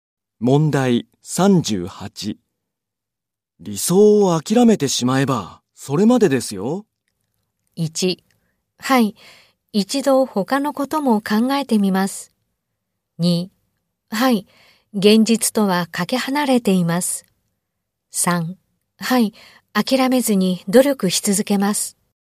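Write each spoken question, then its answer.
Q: 理想を諦めてしまえばそれまでですよ。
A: 3: はい、諦めずに努力し続けます。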